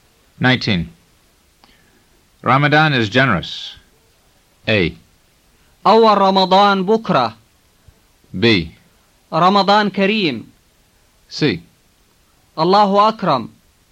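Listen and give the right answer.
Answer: B: رمضان كريم.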